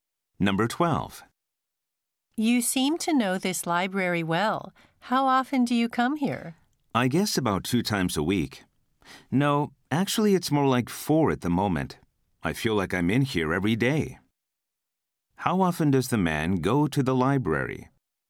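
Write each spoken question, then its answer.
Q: How often does the man go to the library?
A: About 4 times a week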